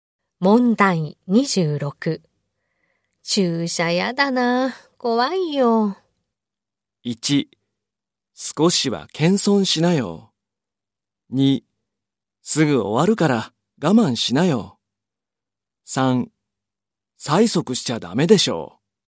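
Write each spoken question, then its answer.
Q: 注射やだな、怖いよ。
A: 2: すぐ終わるから我慢しなよ。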